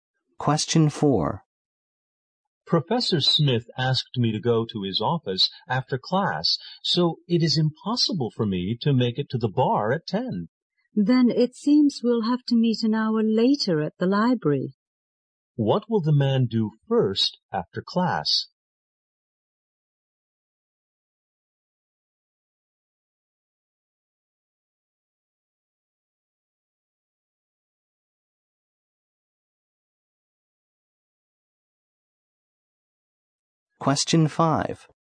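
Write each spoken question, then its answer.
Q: What will the man do first after class?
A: Go to Professor Smith's office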